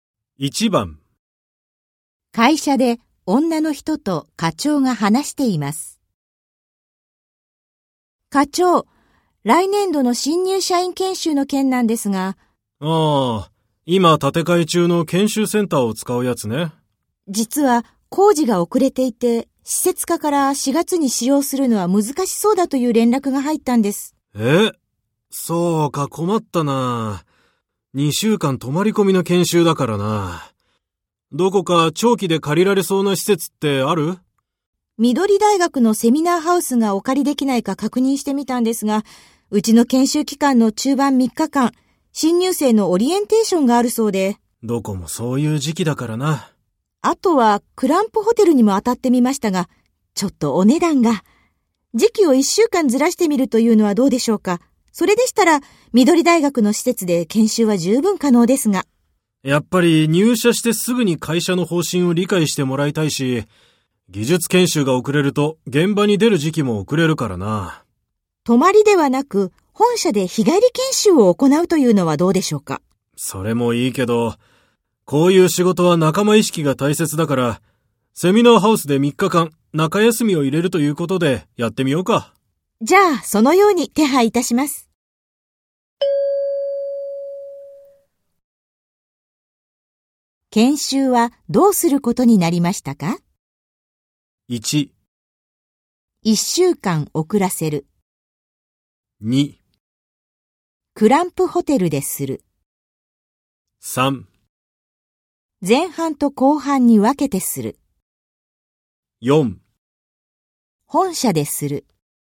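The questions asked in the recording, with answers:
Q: 研修はどうすることになりましたか?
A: 3: 前半と後半に分けてする。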